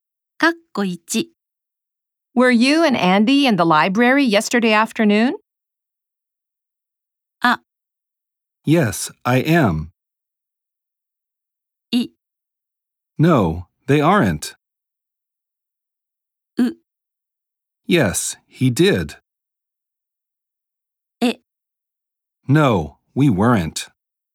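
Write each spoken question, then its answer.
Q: Were you and Andy in the library yesterday afternoon?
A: E: No, we weren't.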